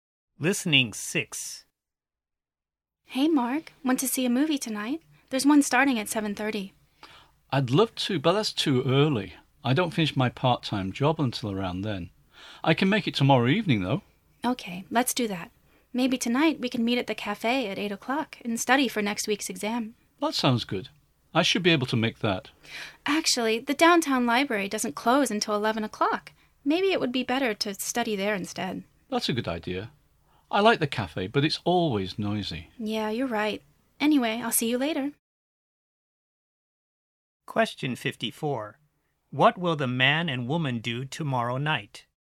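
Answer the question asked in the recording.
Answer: See a movie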